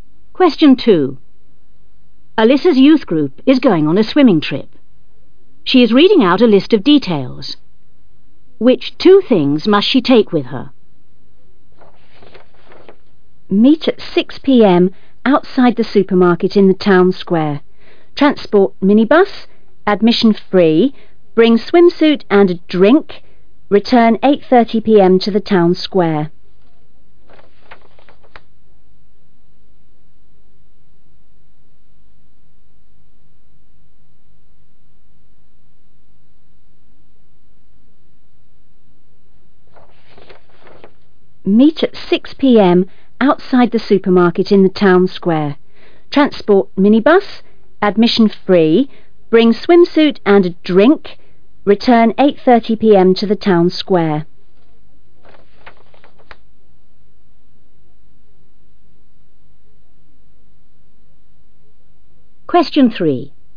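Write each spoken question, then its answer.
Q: Which two things must she take with her?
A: Swimsuit and a drink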